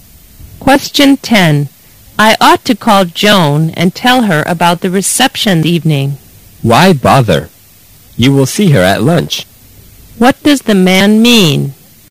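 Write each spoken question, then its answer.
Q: What does the man mean?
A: There is no need to call Joan; she can be told at lunch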